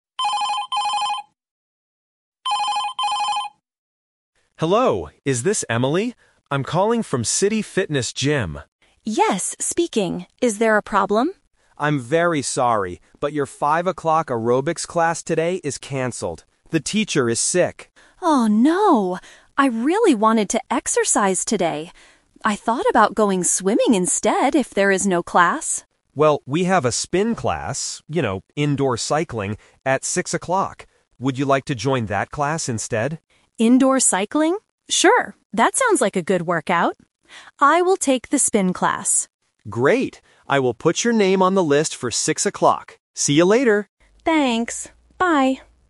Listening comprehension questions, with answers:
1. Why is the receptionist calling Emily?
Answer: To say that a fitness class is canceled.

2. What did Emily think about doing when she heard the bad news?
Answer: Going swimming.

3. What time will Emily exercise today?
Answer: At 6 o'clock.

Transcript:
Receptionist: Hello, is this Emily? I'm calling from City Fitness Gym.
Emily: Yes, speaking. Is there a problem?
Receptionist: I'm very sorry, but your 5 o'clock Aerobics class today is canceled. The teacher is sick.
Emily: Oh no! I really wanted to exercise today. I thought about going swimming instead if there is no class.
Receptionist: Well, we have a Spin class... you know, indoor cycling... Would you like to join that class instead?
Emily: Indoor cycling? Sure, that sounds like a good workout. I will take the Spin class.
Receptionist: Great. I will put your name on the list for 6 o'clock. See you later!